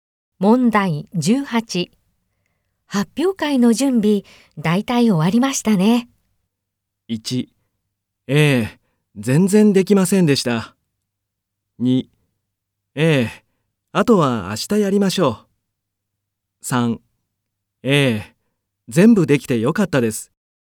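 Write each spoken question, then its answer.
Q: 発表会の準備、大体終わりましたね。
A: 2: ええ、あとは明日やりましょう。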